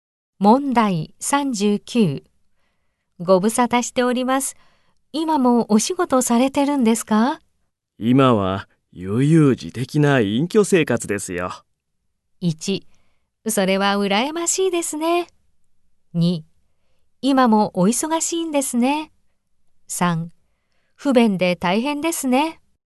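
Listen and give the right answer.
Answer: 1: それは羨ましいですね。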